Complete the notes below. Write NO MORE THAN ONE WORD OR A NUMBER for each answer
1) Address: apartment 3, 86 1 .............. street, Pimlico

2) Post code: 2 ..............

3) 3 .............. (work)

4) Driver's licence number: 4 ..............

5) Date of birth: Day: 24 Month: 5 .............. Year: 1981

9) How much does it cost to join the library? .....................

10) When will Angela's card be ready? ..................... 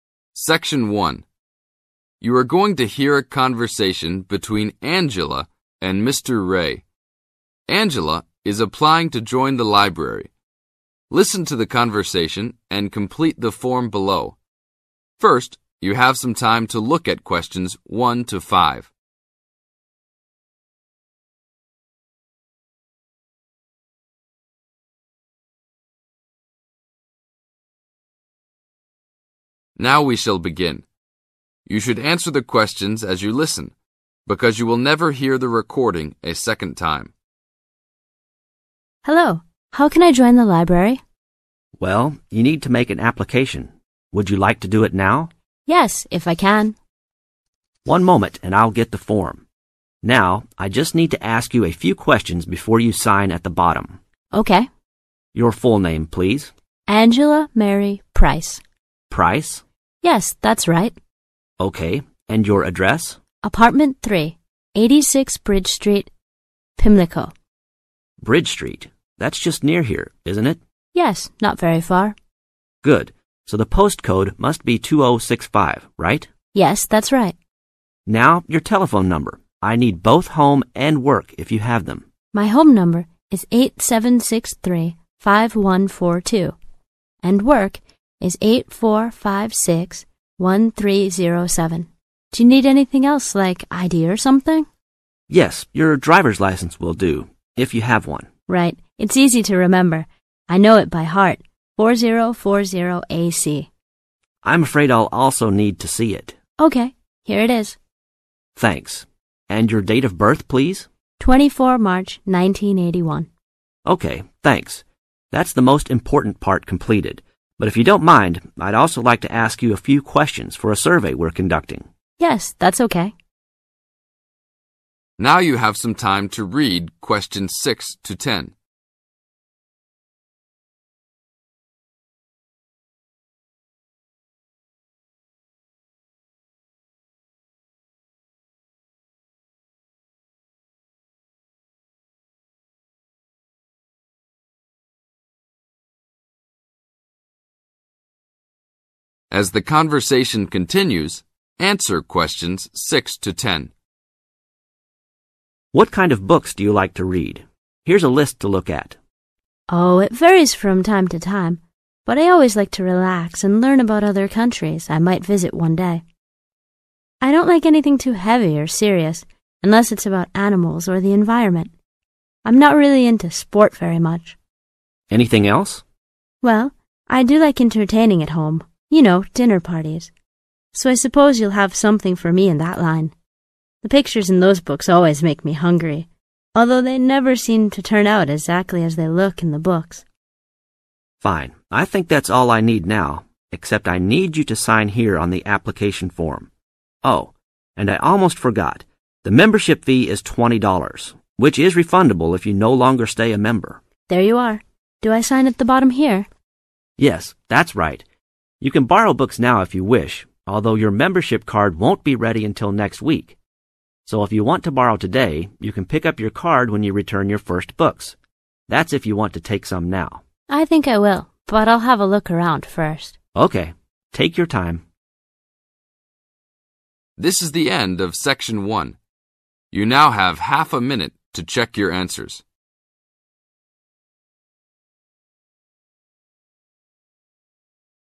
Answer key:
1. bridge
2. 2065
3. 84561307
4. 4040AC
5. March
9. $20
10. next week